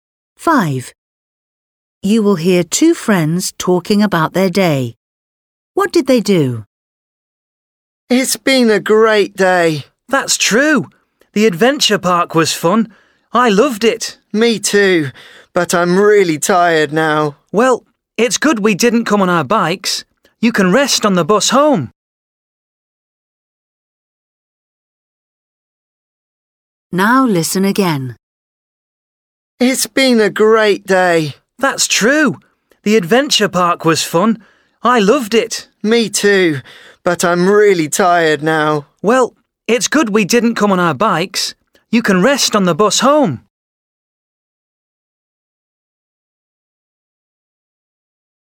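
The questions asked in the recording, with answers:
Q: What did they do?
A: went to an adventure park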